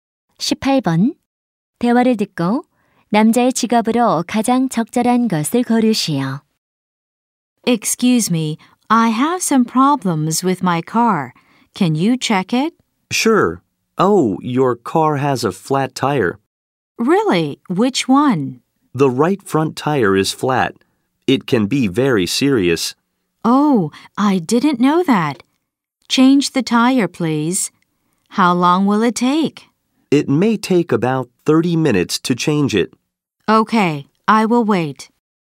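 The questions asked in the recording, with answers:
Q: 대화를 듣고 남자의 직업으로 가장 적절한 것을 고르시오.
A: 자동차 정비사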